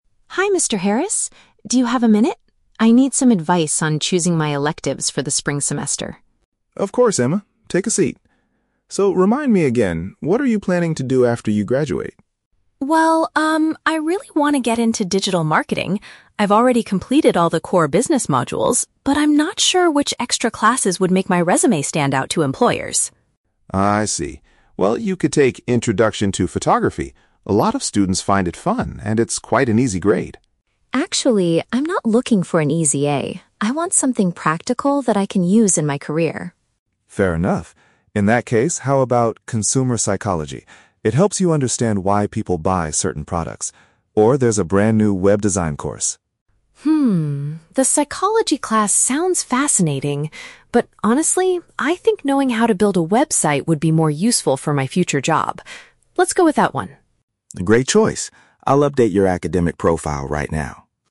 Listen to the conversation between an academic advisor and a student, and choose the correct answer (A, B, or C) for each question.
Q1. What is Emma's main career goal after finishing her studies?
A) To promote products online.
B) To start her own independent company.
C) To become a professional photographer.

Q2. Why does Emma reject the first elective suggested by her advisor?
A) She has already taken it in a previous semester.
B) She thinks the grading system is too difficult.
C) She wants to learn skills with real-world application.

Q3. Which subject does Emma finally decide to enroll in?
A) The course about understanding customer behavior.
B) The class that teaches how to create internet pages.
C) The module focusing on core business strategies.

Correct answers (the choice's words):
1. To promote products online.
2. She wants to learn skills with real-world application.
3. The class that teaches how to create internet pages.

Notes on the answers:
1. Emma says she wants to "get into digital marketing". Option A paraphrases "digital marketing" as "promote products online". The Trap: Option (C) mentions "photographer", which is a trap because "Photography" is a class the advisor suggests, not her career goal. Option (B) is a plausible goal for a business student but is never mentioned in the audio.
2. The advisor suggests Photography because it's an "easy grade," but Emma rejects it, saying she wants "something practical that I can use in my career." Option C paraphrases "practical" as "real-world application". The Trap: Option (B) is a trap. The audio mentions grades, but the advisor says the class is an "easy grade", whereas option B wrongly states she thinks it's "too difficult". Option (A) is a logical reason to reject a class, but it is not mentioned.
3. Emma chooses the "Web Design" course because knowing how to "build a website" would be useful. Option B paraphrases "Web Design / build a website" as "create internet pages". The Trap: Option (A) refers to "Consumer Psychology" (understanding why people buy products). This is a trap because she finds it fascinating but explicitly chooses not to take it. Option (C) is a trap because she has already completed her core business modules.

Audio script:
Emma: Hi Mr. Harris. Do you have a minute? I need some advice on choosing my electives for the spring semester.
Mr. Harris: Of course, Emma. Take a seat. So, remind me again, what are you planning to do after you graduate?
Emma: Well, um, I really want to get into digital marketing. I've already completed all the core business modules, but I'm not sure which extra classes would make my resume stand out to employers.
Mr. Harris: I see. Well, you could take "Introduction to Photography". A lot of students find it fun and it's quite an easy grade.
Emma: Actually, I'm not looking for an easy (A) I want something practical that I can use in my career.
Mr. Harris: Fair enough. In that case, how about "Consumer Psychology"? It helps you understand why people buy certain products. Or, there's a brand new "Web Design" course.
Emma: Hmm, the psychology class sounds fascinating, but honestly, I think knowing how to build a website would be more useful for my future job.